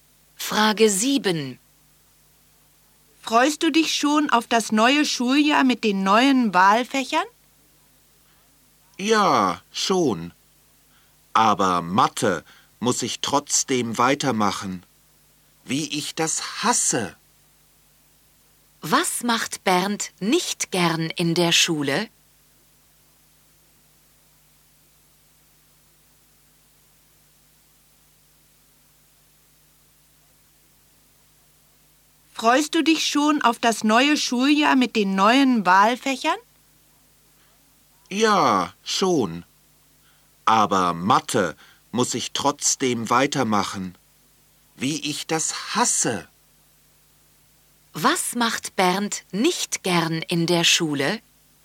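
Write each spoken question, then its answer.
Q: Was macht Bernd nicht gern in der Schule?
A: Mathe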